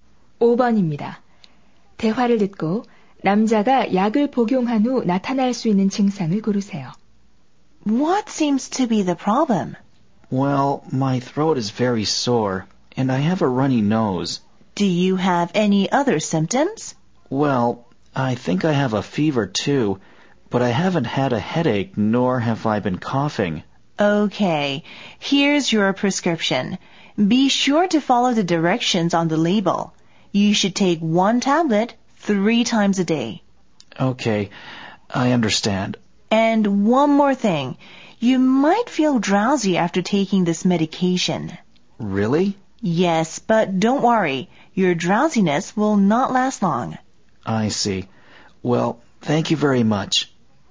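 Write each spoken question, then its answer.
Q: 대화를 듣고 남자가 약을 복용한 후 나타날 수 있는 증상을 고르세요.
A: 졸음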